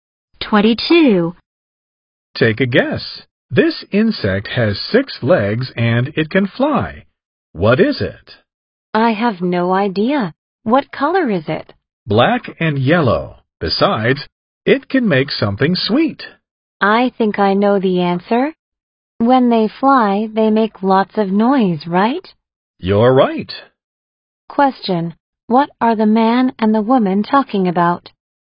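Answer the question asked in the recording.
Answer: Bees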